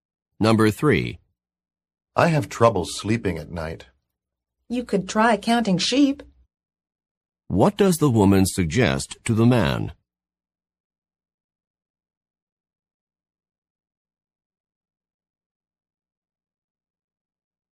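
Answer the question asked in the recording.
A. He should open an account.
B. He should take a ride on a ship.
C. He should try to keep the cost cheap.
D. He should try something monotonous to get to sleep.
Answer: D. He should try something monotonous to get to sleep.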